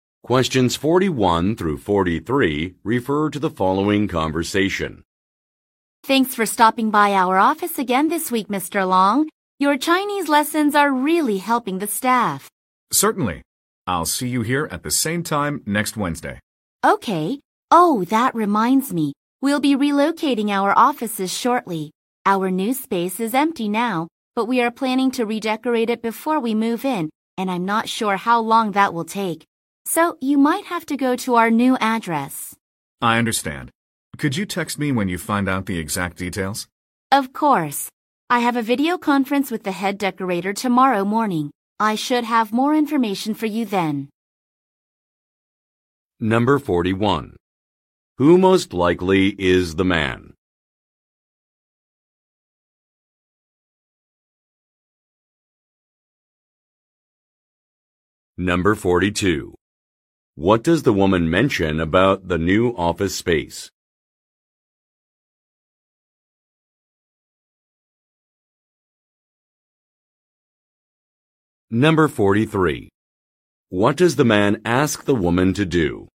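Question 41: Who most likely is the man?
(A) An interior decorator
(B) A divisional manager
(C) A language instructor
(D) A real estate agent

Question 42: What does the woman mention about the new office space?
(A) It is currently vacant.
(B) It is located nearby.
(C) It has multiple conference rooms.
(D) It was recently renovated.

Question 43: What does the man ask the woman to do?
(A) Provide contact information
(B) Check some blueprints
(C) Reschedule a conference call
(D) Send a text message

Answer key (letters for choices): 41C, 42A, 43D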